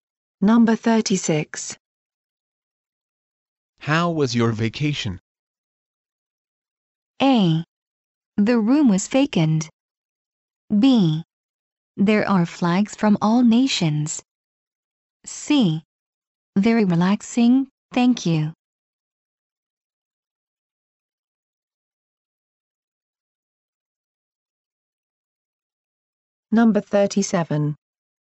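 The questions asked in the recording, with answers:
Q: How was your vacation?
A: C: Very relaxing, thank you.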